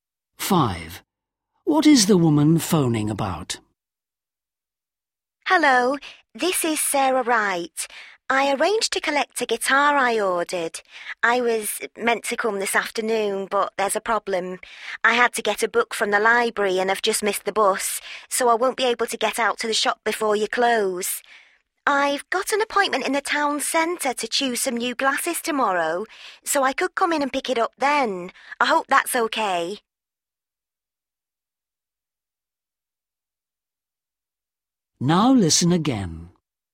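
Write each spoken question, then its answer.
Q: What is the woman phoning about?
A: Collecting the guitar she ordered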